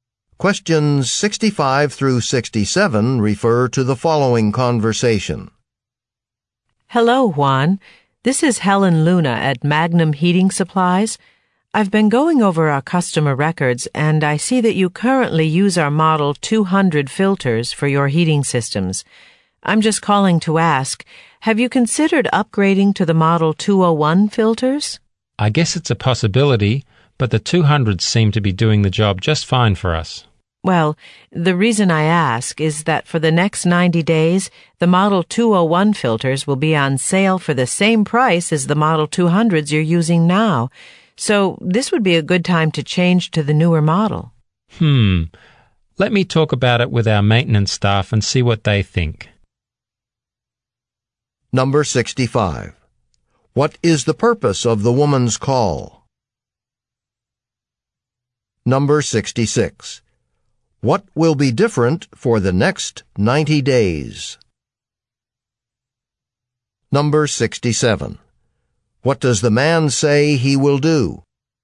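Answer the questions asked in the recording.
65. To suggest upgrading to the model 201 filters
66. The model 201 filters will be on sale at the model 200 price
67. Talk with his maintenance staff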